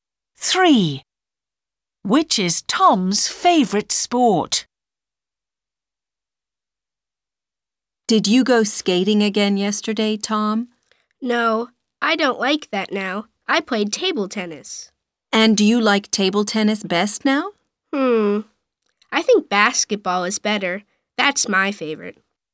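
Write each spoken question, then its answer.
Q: Which is Tom's favorite sport?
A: Basketball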